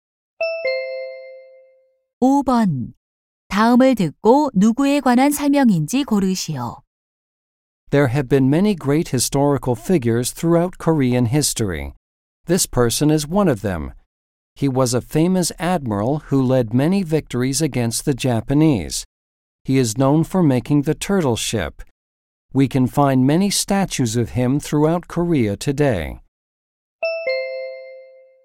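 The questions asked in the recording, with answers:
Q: 다음을 듣고 누구에 관한 설명인지 고르시오.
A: 이순신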